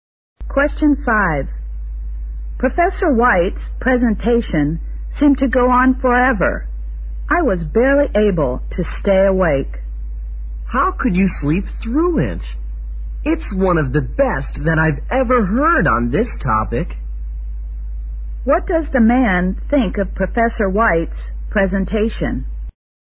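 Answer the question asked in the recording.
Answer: It was one of the best he has heard on the topic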